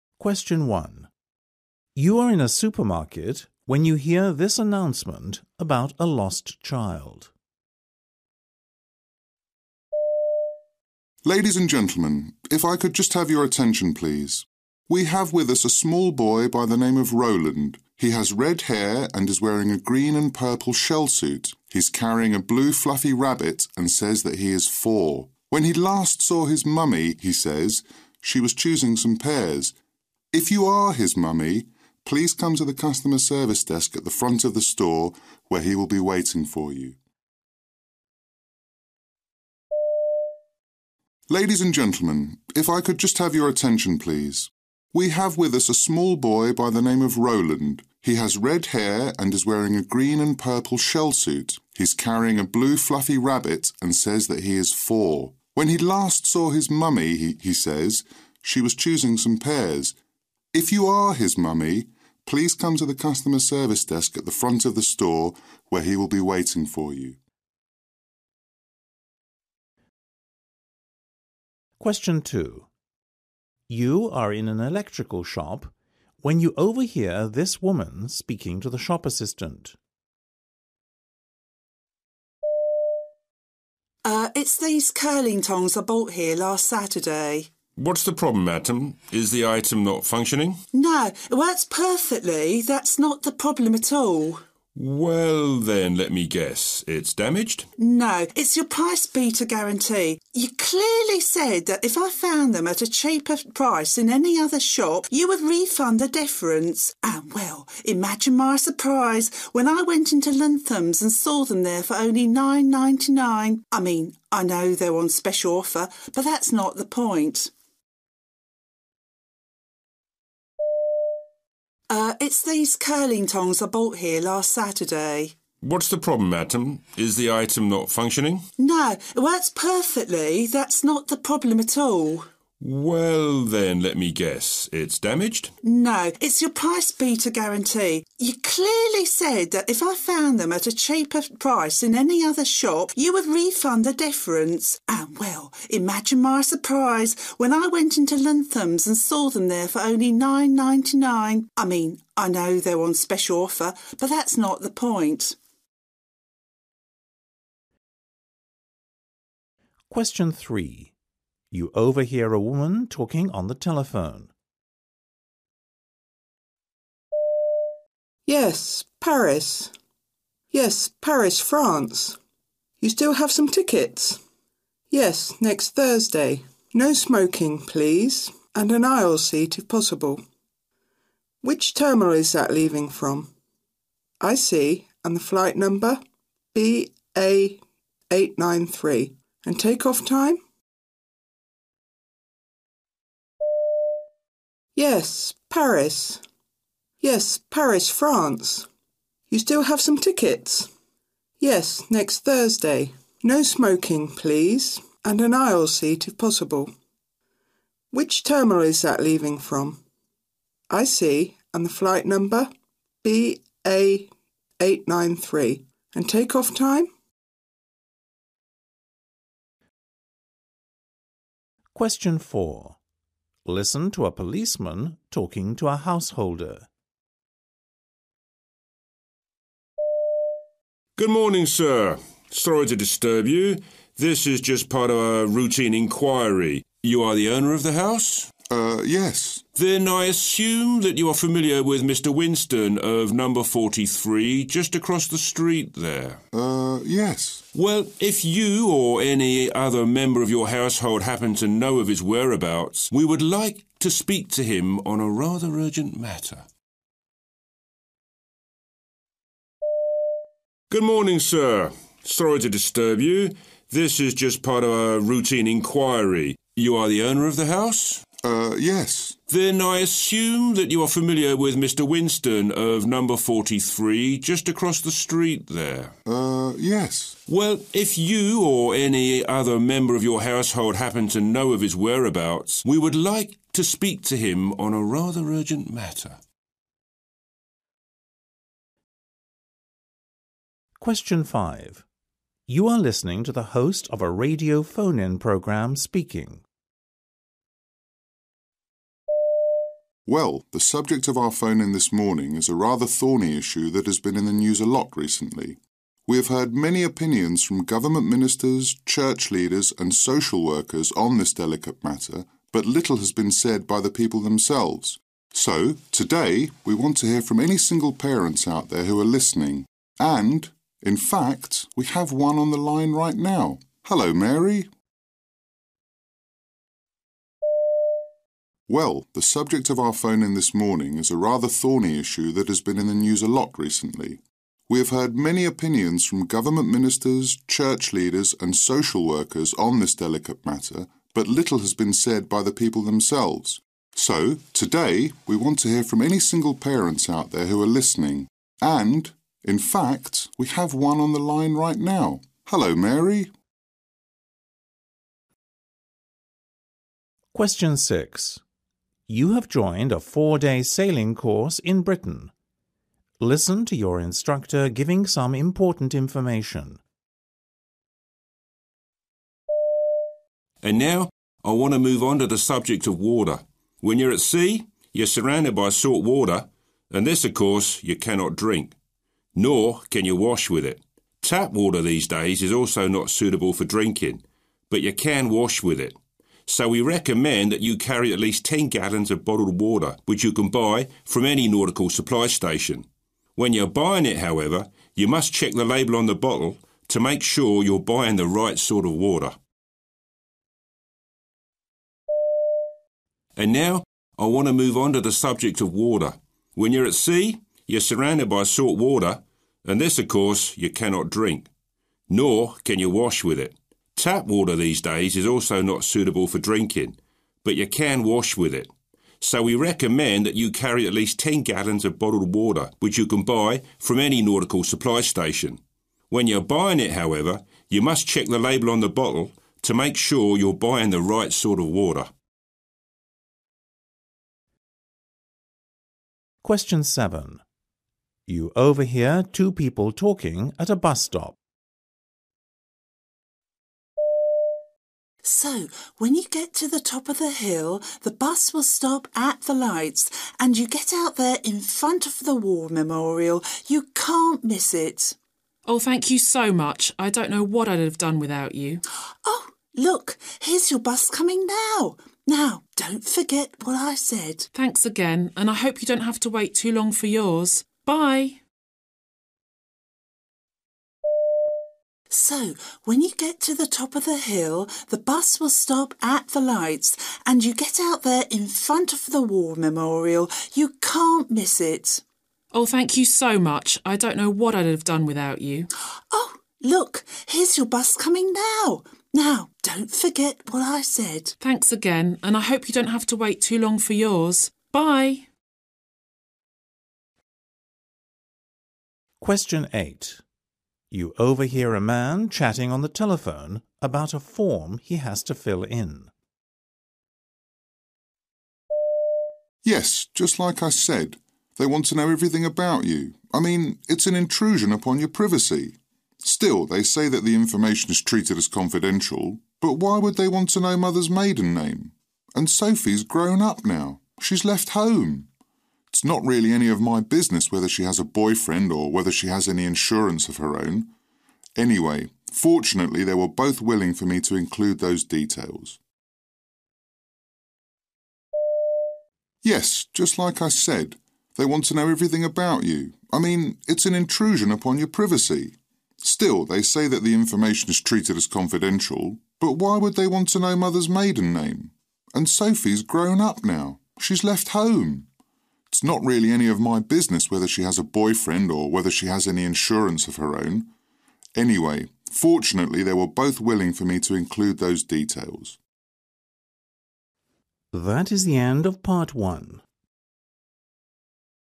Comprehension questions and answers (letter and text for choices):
You will hear people talking in eight different situations. For questions 1-8, choose the best answer (A, B or C).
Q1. Where did he last see his mother?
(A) in the butcher's area.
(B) in the pet food area.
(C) in the fruit and vegetable area.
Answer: (C) in the fruit and vegetable area.

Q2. Why is she complaining?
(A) she was charged the wrong amount.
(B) the same item is cheaper elsewhere.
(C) the item was damaged.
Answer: (B) the same item is cheaper elsewhere.

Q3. What does the policeman want to do?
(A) speak to another member of the household.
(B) speak to the householder.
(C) speak to a neighbour.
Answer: (C) speak to a neighbour.

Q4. Mary, the first caller, is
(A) a married woman with a child.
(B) a single woman with a child.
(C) a regular listener.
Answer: (B) a single woman with a child.

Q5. What is he talking about?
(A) drinking water.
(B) salt water.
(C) running out of water.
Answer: (A) drinking water.

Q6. The man is speaking to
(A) his wife.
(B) his mother.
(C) his daughter.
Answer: (A) his wife.

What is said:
1 You are in a supermarket when you hear this announcement about a lost child.
Ladies and gentlemen. If I could just have your attention, please. We have with us a small boy by the name of Roland. He has red hair and is wearing a green and purple shell-suit. He is carrying a blue fluffy rabbit and says that he is four. When he last saw his mummy, he says, she was choosing some pears. If you are his mummy, please come to the customer service desk at the front of the store where he will be waiting for you.
2 You are in an electrical shop when you overhear this woman speaking to the shop assistant.
W: Er, is these curling tongs I bought here last Saturday?
M: What's the problem, madam? Is the item not functioning?
W: No, it works perfectly. That's not the problem at all.
M: Well, then let me guess. It's damaged?
W: No, it's your price-beater guarantee. You clearly said that if I found them at a cheaper price in any other shop, you would refund the difference and, well, imagine my surprise when I went into Lunthams and saw them there for only nine ninety-nine. I mean I know they were on special offer but that's not the point.
3 You overhear a woman talking on the telephone.
Yes, Paris ... Yes, Paris, France ... You still have some tickets? Yes, next Thursday ... 'No-smoking' please, and an aisle seat if possible. Which terminal is that leaving from? I see. And the flight number ...
4 Listen to a policeman talking to a householder.
P: Good morning, sir. Sorry to disturb you. This is just part of a routine inquiry. You are the owner of the house.
P: Then I assume that you are familiar with a Mr Winston of number 43 just across the street there.
P: Well, if you or any other member of your household happen to know of his whereabouts, we would like to speak to him on a rather urgent matter.
You are listening to the host of a radio phone-in programme speaking.
Well, the subject of our phone-in this morning is a rather thorny issue that has been in the news a lot recently. We have heard many opinions from government ministers, church leaders and social workers on this delicate matter but little has been said by the people themselves. So, today, we want to hear from any single parents out there who are listening and, in fact, we have one on the line right now. Hello, Mary ...
You have joined a four-day sailing course in Britain.
...and now I want to move on to the subject of water. When you're at sea, you're surrounded by salt water and this, of course, you cannot drink. Nor can you wash with it. Tap water these days is also not suit able for drinking, but you can wash with it. So we recommend that you carry at least ten gallons of bottled water, which you can buy from any nautical supply station. When you are buying it, however, you must check the label on the bottle to make sure you're buying the right sort of water.
You overhear two people talking at a bus stop.
W1 = Woman 1 W2 = Woman 2
W1: So, when you get to the top of the hill, the bus will stop at the lights and you get out there in front of the war memorial. You can't miss it.
W2: Oh, thank you so much. I don't know what I'd have done without you.
W1: Oh, look, here's your bus coming now. Now, don't forget what I said.
W2: Thanks again. And I hope you don't have to wait too long for yours. Bye.
You overhear a man chatting on the telephone about a form he has to fill in.
Yes, just like I said ... They want to know everything about you. I mean it's an intrusion upon your privacy. Still, they say that the information is treated as confidential. But why would they want to know mother's maiden name? And Sophie's grown up now. She's left home. It's not really any of my business whether she has a boyfriend or whether she has any insurance of her own. Anyway, fortunately, they were both willing for me to include those details.

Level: B2